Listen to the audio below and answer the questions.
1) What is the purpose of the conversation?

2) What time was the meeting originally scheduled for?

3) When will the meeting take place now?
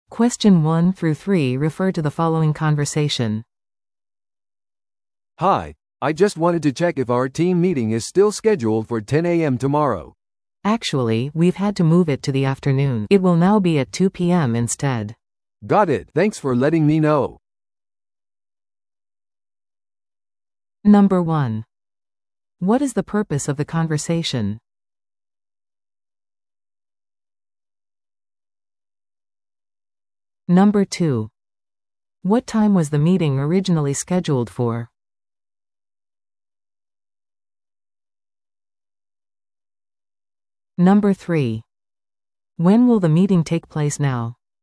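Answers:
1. To confirm the team meeting time, which has been changed
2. 10 a.m.
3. At 2 p.m. tomorrow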